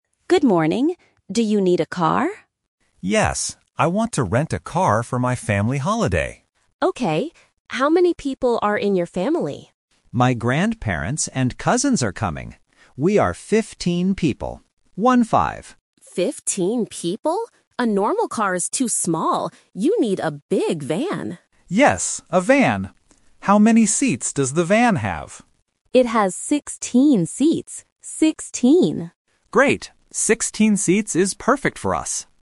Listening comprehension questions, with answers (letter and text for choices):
Listen to the conversation at a car rental shop. Choose the correct answer (A, B, or C) for each question.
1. Who is coming on the holiday with the customer?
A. His parents and sister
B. His grandparents and cousins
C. His aunt and uncle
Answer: B. His grandparents and cousins

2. What kind of vehicle does the customer need?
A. A normal car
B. A big bus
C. A big van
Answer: C. A big van

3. How many seats does the vehicle have?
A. 15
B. 16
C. 60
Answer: B. 16

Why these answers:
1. The customer clearly says, "My grandparents and cousins are coming." Option A and Option C use other family words to trick the listener, but they are never mentioned in the audio.
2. At first, the customer asks for a "car" (Option A is the trap). But the agent says a normal car is too small and spells out the correct vehicle: "You need a big van. V-A-N." Option B (bus) is just a plausible wrong answer.
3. The customer asks how many seats the van has, and the agent answers, "It has 16 seats. Sixteen." Option A (15) is a trap because 15 is the number of people, not the number of seats. Option C (60) is a phonetic trap because "sixteen" and "sixty" sound similar to beginners.